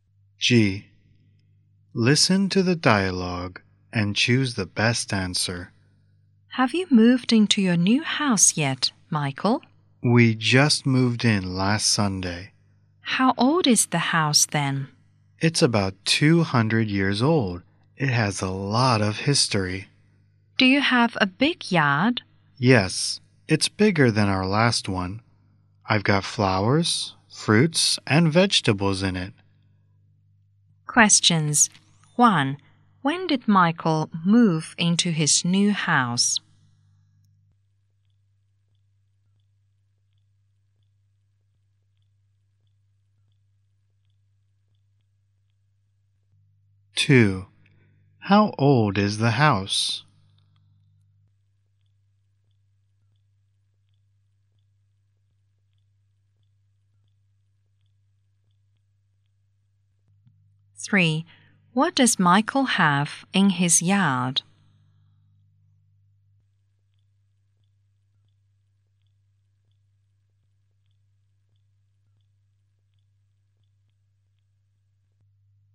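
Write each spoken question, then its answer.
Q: When did Michael move into his new house?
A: Last Sunday

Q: How old is the house?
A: About 200 years old

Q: What does Michael have in his yard?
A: Flowers, fruits, and vegetables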